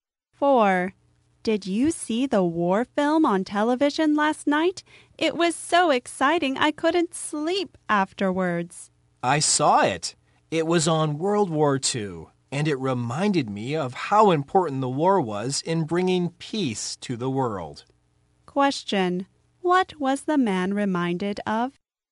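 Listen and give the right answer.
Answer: How important the war was in bringing peace to the world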